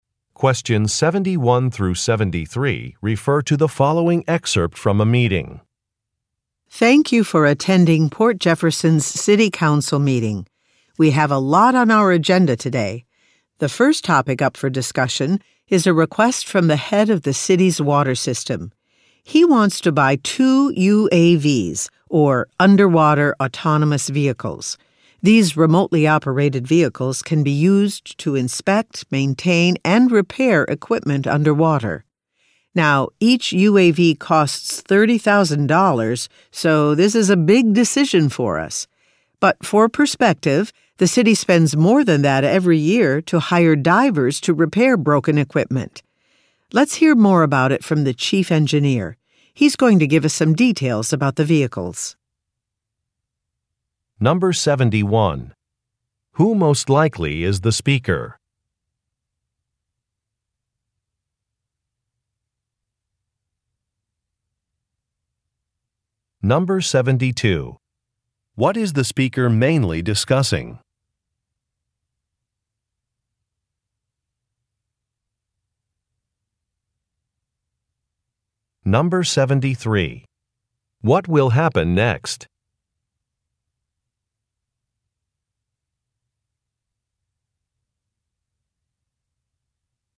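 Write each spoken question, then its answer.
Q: What is the speaker mainly discussing?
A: A request to buy two underwater vehicles for the city's water system

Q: What will happen next?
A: The chief engineer will give details about the vehicles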